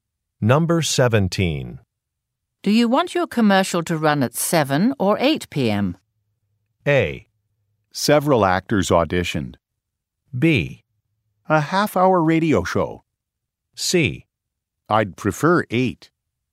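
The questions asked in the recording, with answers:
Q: Do you want your commercial to run at 7 or 8 p.m.?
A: C: I'd prefer 8.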